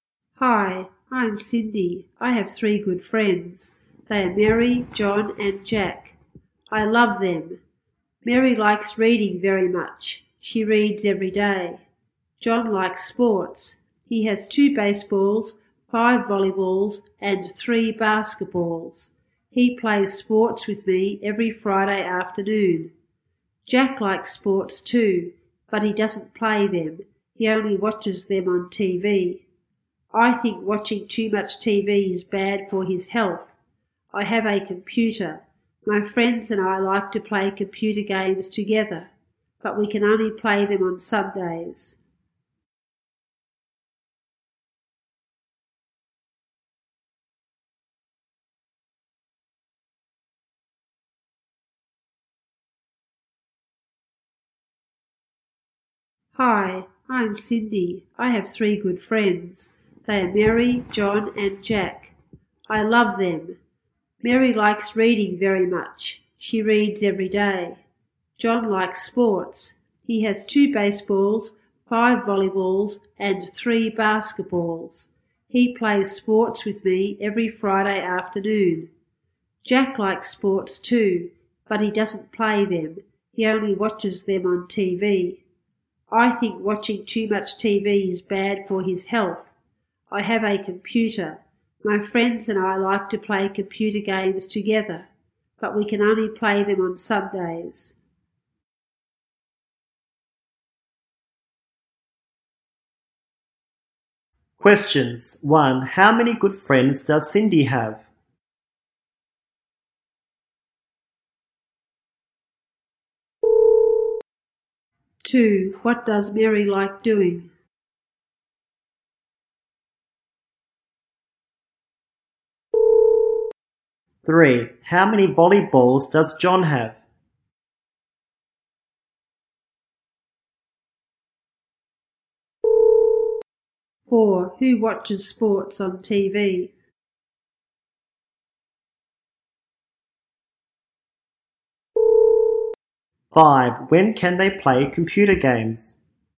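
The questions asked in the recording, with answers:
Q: How many good friends does Cindy have?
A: Three

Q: What does Mary like doing?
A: Reading

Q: How many volleyballs does John have?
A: Five

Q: Who watches sports on TV?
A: Jack

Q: When can they play computer games?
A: On Sundays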